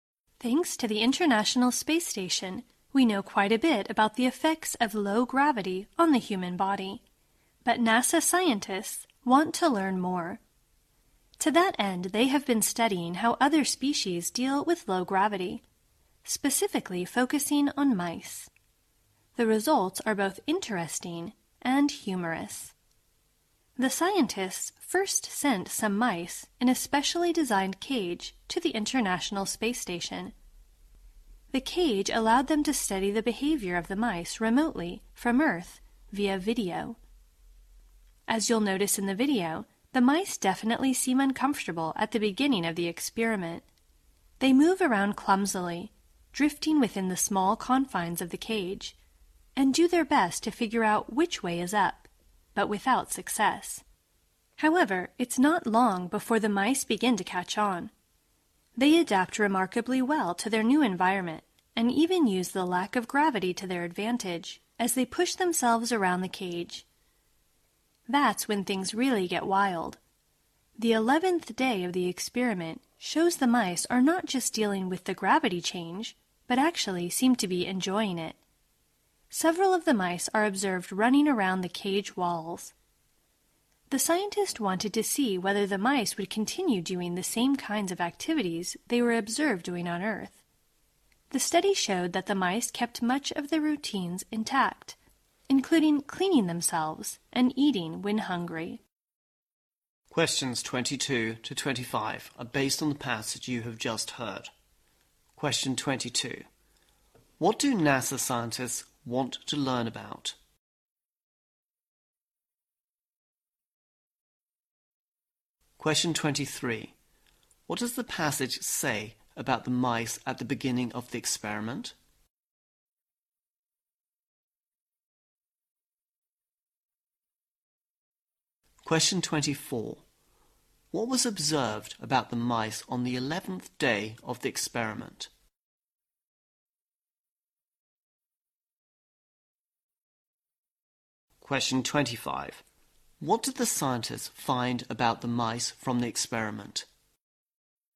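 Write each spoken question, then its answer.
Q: What do NASA scientists want to learn about?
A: How other species, such as mice, deal with low gravity

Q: What does the passage say about the mice at the beginning of the experiment?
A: They seemed uncomfortable and moved around clumsily

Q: What was observed about the mice on the 11th day of the experiment?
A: They seemed to enjoy it, running around the cage walls

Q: What did the scientists find about the mice from the experiment?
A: They kept much of their routines, like cleaning themselves and eating when hungry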